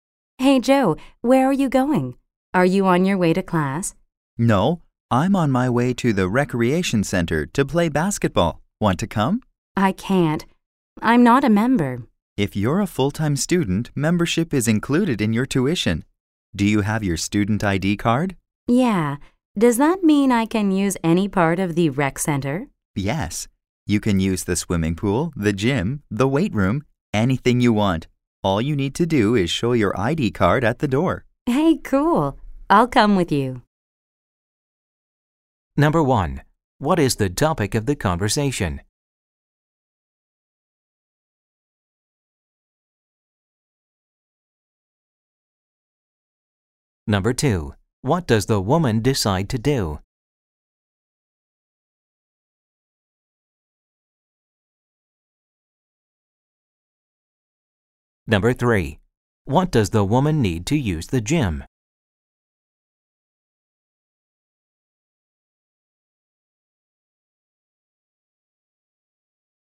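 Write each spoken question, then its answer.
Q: What is the topic of the conversation?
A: Using the campus recreation center (membership for students)

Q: What does the woman decide to do?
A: Go with Joe to the recreation center

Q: What does the woman need to use the gym?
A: Her student ID card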